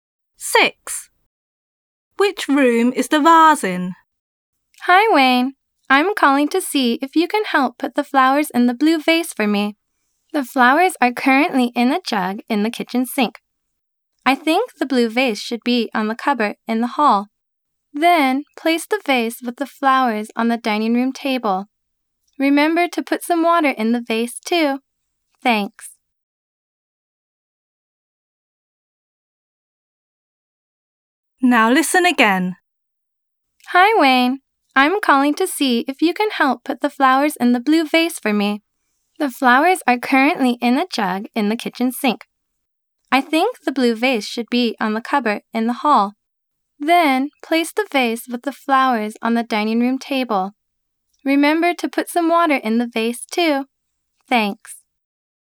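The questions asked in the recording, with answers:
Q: Which room is the vase in?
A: The hall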